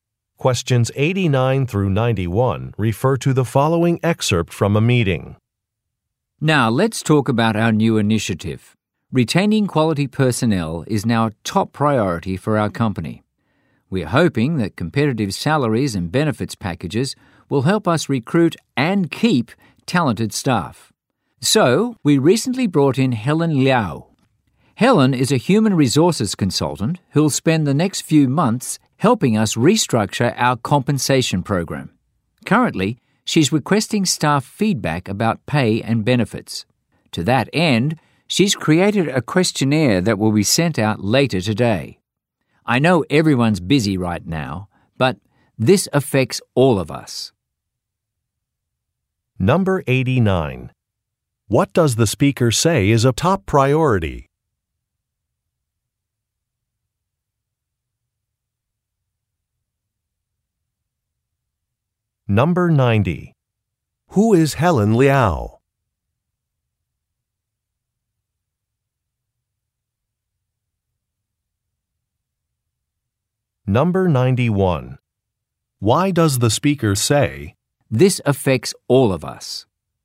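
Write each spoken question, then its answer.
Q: What does the speaker say is a top priority?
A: Retaining quality personnel

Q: Who is Helen Liao?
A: A human resources consultant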